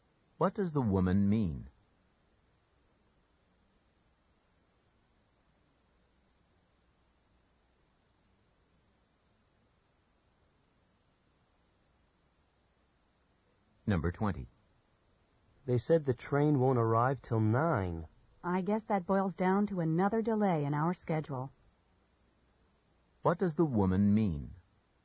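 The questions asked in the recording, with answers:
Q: What does the woman mean?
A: Their schedule will be delayed again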